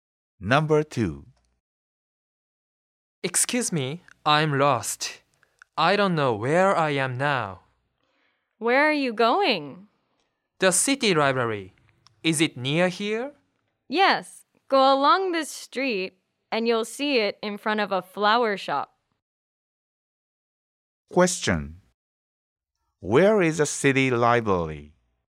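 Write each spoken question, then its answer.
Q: Where is the city library?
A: In front of a flower shop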